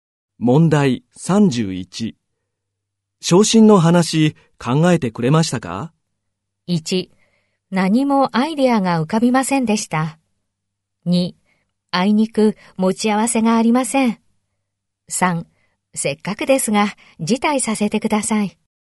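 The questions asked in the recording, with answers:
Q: 昇進の話、考えてくれましたか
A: 3: せっかくですが辞退させてください。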